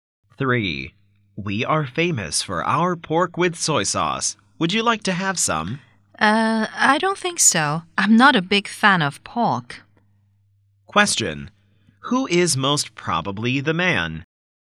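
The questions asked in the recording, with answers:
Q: Who is most probably the man?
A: A waiter.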